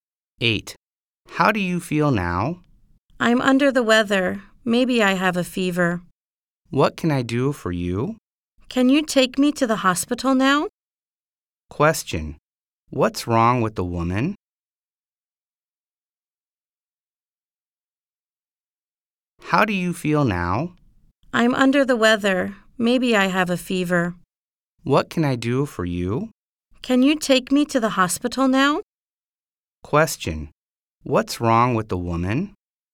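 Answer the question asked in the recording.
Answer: She feels sick; maybe she has a fever.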